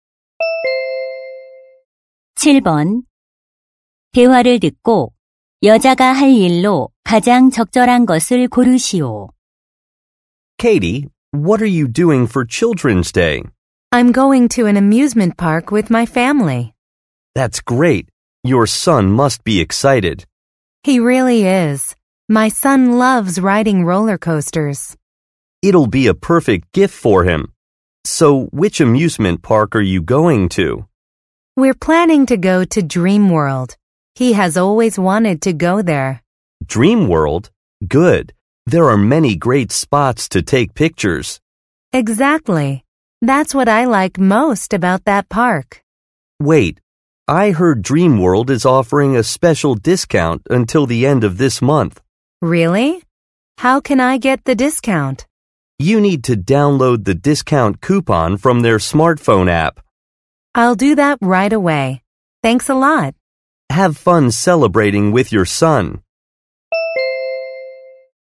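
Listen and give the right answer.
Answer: 스마트폰 앱에서 할인 쿠폰 다운로드하기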